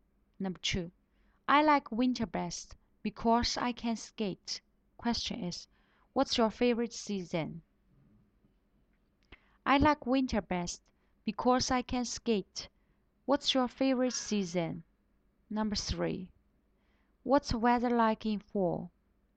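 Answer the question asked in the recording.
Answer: Winter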